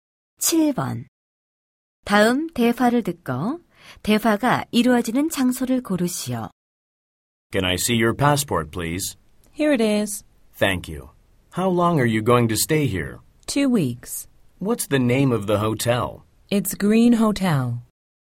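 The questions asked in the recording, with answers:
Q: 다음 대화를 듣고 대화가 이루어지는 장소를 고르시오.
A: 공항 (입국 심사대)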